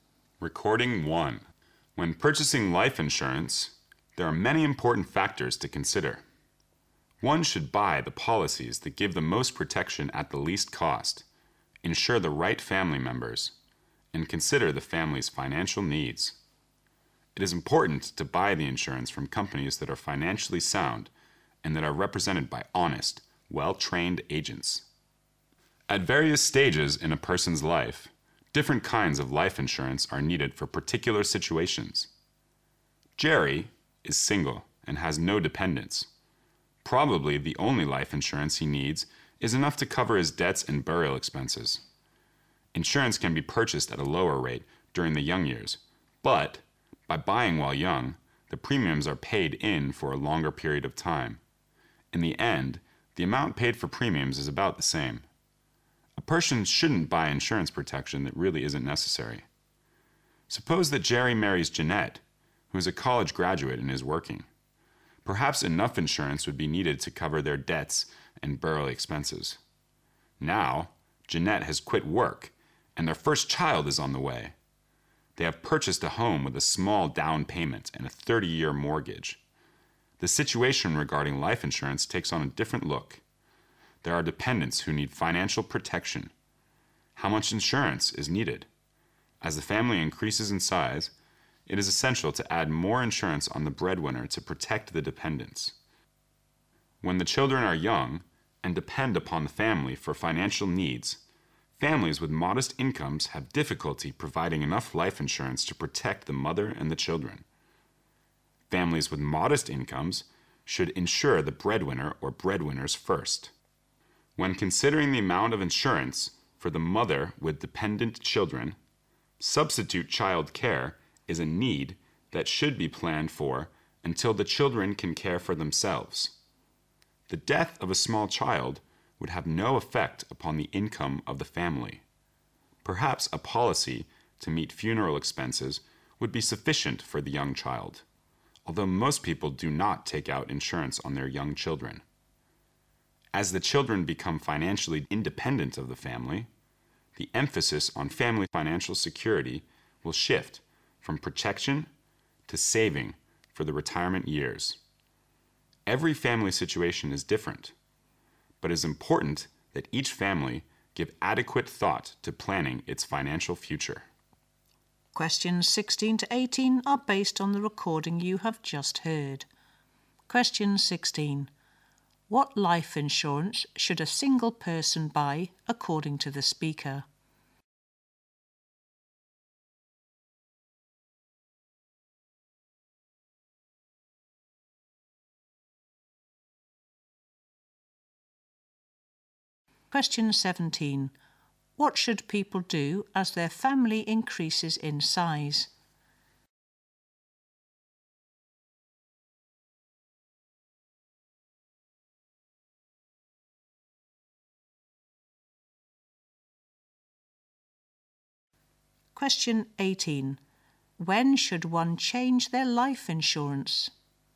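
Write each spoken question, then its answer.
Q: What life insurance should a single person buy according to the speaker?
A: Just enough to cover debts and burial expenses

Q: What should people do as their family increases in size?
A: Add more insurance on the breadwinner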